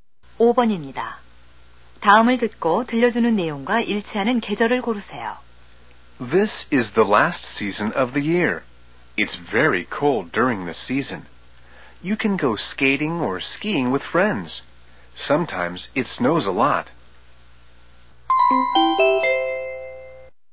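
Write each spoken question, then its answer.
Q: 다음을 듣고 들려주는 내용과 일치하는 계절을 고르세요.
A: 겨울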